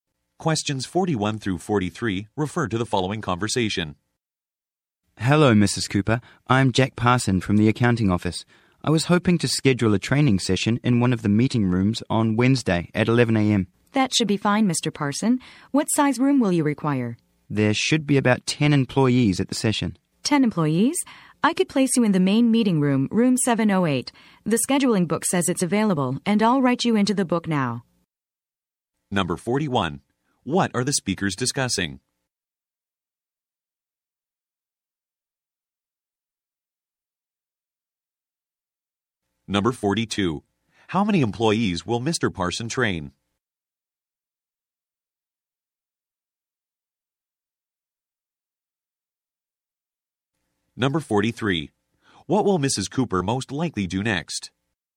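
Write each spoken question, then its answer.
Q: What are the speakers discussing?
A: Scheduling a meeting room for a training session

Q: How many employees will Mr. Parson train?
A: About 10

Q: What will Mrs. Cooper most likely do next?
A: Write Mr. Parson into the scheduling book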